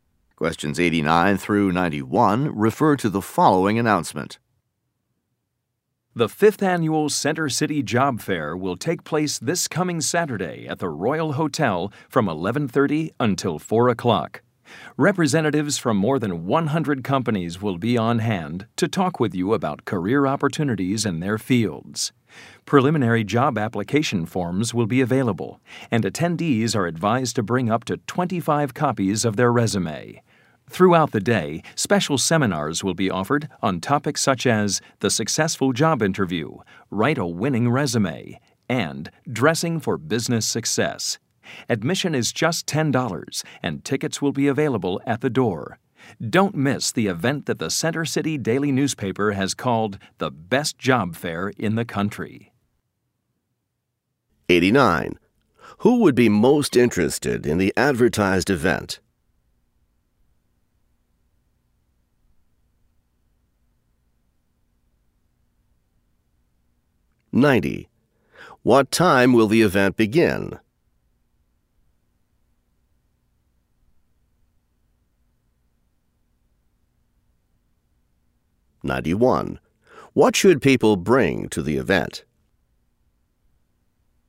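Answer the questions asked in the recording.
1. Job seekers
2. 11:30
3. Copies of their resume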